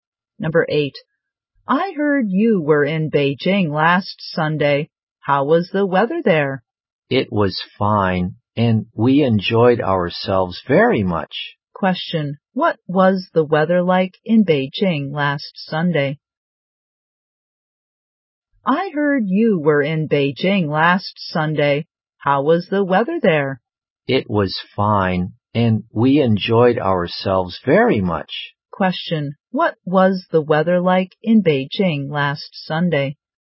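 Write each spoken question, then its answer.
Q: What was the weather like in Beijing last Sunday?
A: Fine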